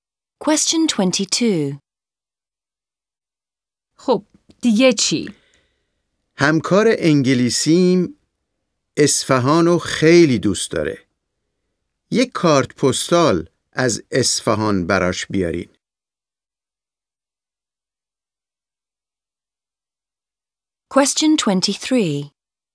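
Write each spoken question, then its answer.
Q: خب دیگه چی؟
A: کارت پستال از اصفهان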